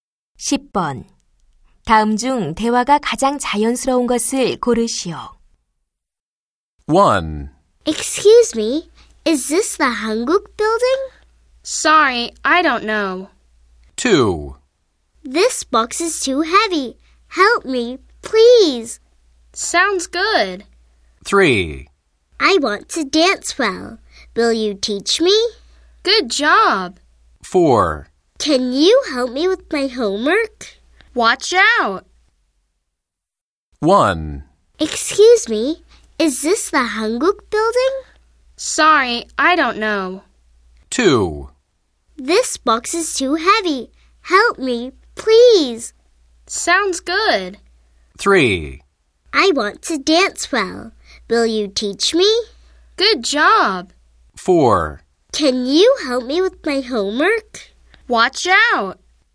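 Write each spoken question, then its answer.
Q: 다음 중 대화가 가장 자연스러운 것을 고르시오.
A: 1: Excuse me, is this the Hanguk building? / Sorry, I don't know.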